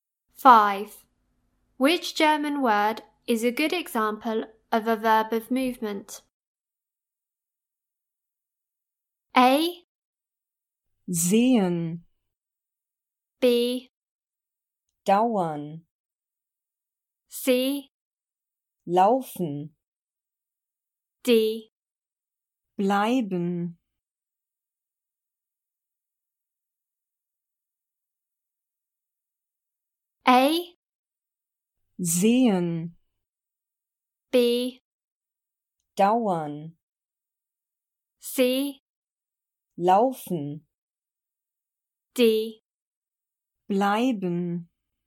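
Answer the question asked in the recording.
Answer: C: Laufen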